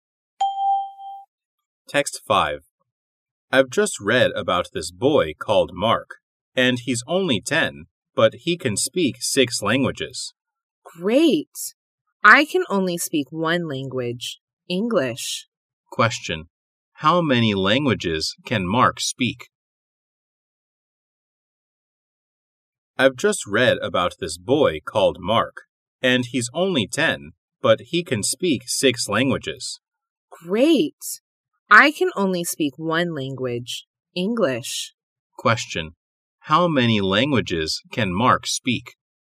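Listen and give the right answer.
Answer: Six.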